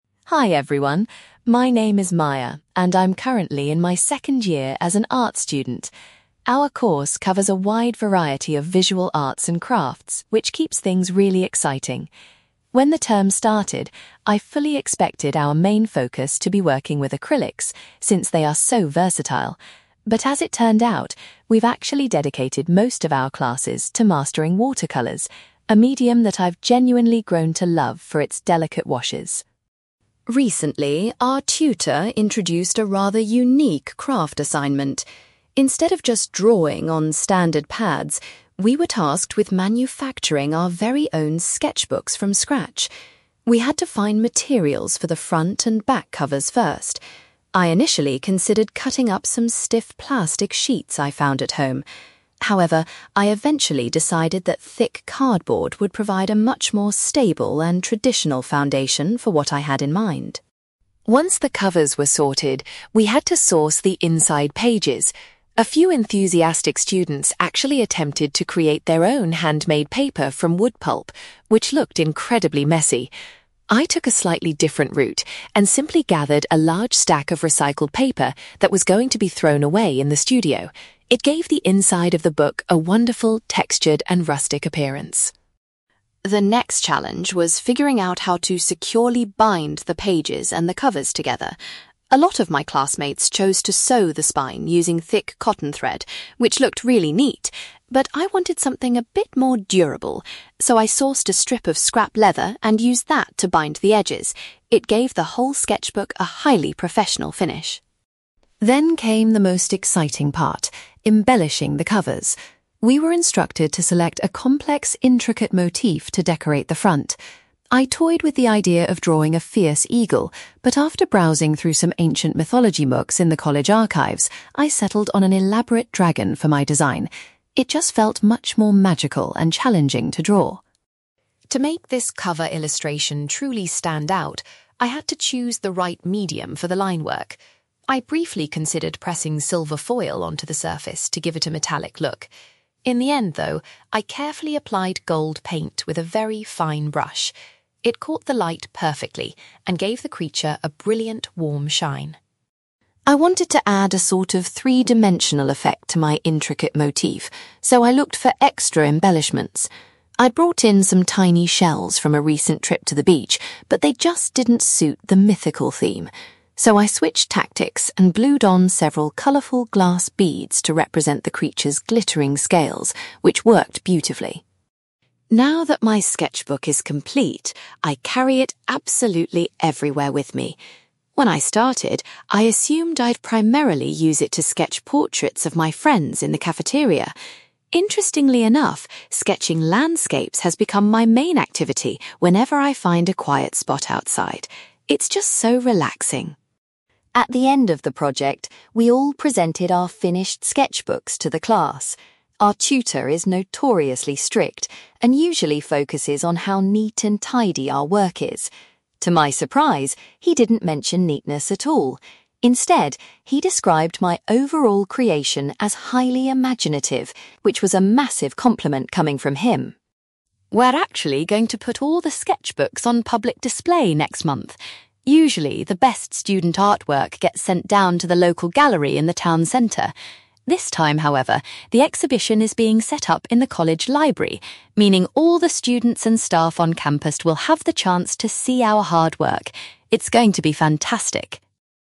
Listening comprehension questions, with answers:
You will hear an art student called Maya giving a presentation about a recent craft project. For questions 9-18, complete the sentences with a word or short phrase.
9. Maya was surprised that the art class focused on using (9)........................... this term.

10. Maya chose to use (10)........................... to make the front and back covers of her sketchbook.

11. Maya decided to fill her sketchbook with (11)........................... she found in the art studio.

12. Maya used a piece of (12)........................... to tie the pages and cover together securely.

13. Maya was inspired by some old books to draw a (13)........................... on the front of her sketchbook.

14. Maya applied (14)........................... to her cover design to make it shine.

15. Maya added some (15)........................... to her cover to create a 3D effect.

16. Maya currently uses her sketchbook mostly for drawing (16)........................... when she is outdoors.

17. Maya was thrilled when her teacher called her sketchbook work (17)........................... .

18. The students' sketchbooks will be shown at an exhibition in the (18)........................... next month.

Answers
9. watercolours
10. cardboard
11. recycled paper
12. leather
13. dragon
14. gold paint
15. glass beads
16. landscapes
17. imaginative
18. college library

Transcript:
Maya: Hi everyone! My name is Maya, and I'm currently in my second year as an art student. Our course covers a wide variety of visual arts and crafts, which keeps things really exciting. When the term started, I fully expected our main focus to be working with acrylics, since they are so versatile. But as it turned out, we've actually dedicated most of our classes to mastering watercolours, a medium that I've genuinely grown to love for its delicate washes.
Recently, our tutor introduced a rather unique craft assignment. Instead of just drawing on standard pads, we were tasked with manufacturing our very own sketchbooks from scratch. We had to find materials for the front and back covers first. I initially considered cutting up some stiff plastic sheets I found at home. However, I eventually decided that thick cardboard would provide a much more stable and traditional foundation for what I had in mind.
Once the covers were sorted, we had to source the inside pages. A few enthusiastic students actually attempted to create their own handmade paper from wood pulp, which looked incredibly messy! I took a slightly different route and simply gathered a large stack of recycled paper that was going to be thrown away in the studio. It gave the inside of the book a wonderful, textured, and rustic appearance.
The next challenge was figuring out how to securely bind the pages and the covers together. A lot of my classmates chose to sew the spine using thick cotton thread, which looked really neat. But I wanted something a bit more durable, so I sourced a strip of scrap leather and used that to bind the edges. It gave the whole sketchbook a highly professional finish.
Then came the most exciting part: embellishing the covers! We were instructed to select a complex, intricate motif to decorate the front. I toyed with the idea of drawing a fierce eagle, but after browsing through some ancient mythology books in the college archives, I settled on an elaborate dragon for my design. It just felt much more magical and challenging to draw.
To make this cover illustration truly stand out, I had to choose the right medium for the line work. I briefly considered pressing silver foil onto the surface to give it a metallic look. In the end, though, I carefully applied gold paint with a very fine brush. It caught the light perfectly and gave the creature a brilliant, warm shine.
I wanted to add a sort of three-dimensional effect to my intricate motif, so I looked for extra embellishments. I'd brought in some tiny shells from a recent trip to the beach, but they just didn't suit the mythical theme. So, I switched tactics and glued on several colourful glass beads to represent the creature's glittering scales, which worked beautifully.
Now that my sketchbook is complete, I carry it absolutely everywhere with me. When I started, I assumed I'd primarily use it to sketch portraits of my friends in the cafeteria. Interestingly enough, sketching landscapes has become my main activity whenever I find a quiet spot outside. It's just so relaxing.
At the end of the project, we all presented our finished sketchbooks to the class. Our tutor is notoriously strict and usually focuses on how neat and tidy our work is. To my surprise, he didn't mention neatness at all; instead, he described my overall creation as highly imaginative, which was a massive compliment coming from him!
We're actually going to put all the sketchbooks on public display next month. Usually, the best student artwork gets sent down to the local gallery in the town centre. This time, however, the exhibition is being set up in the college library, meaning all the students and staff on campus will have the chance to see our hard work. It's going to be fantastic!

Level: B2